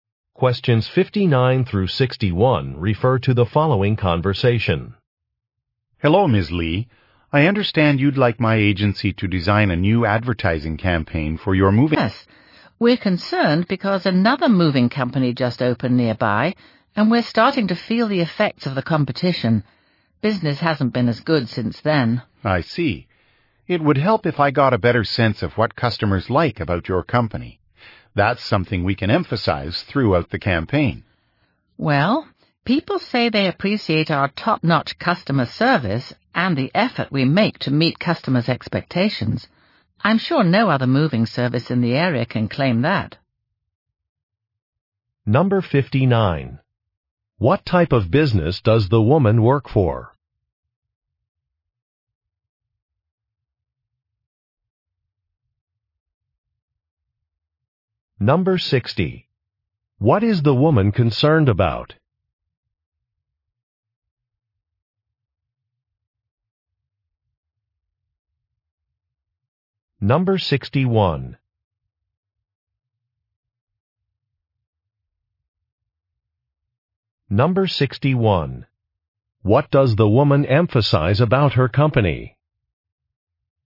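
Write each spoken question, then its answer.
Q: What type of business does the woman work for?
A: A moving company

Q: What is the woman concerned about?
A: Competition from a new moving company

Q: Number 61. What does the woman emphasize about her company?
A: Its top-notch customer service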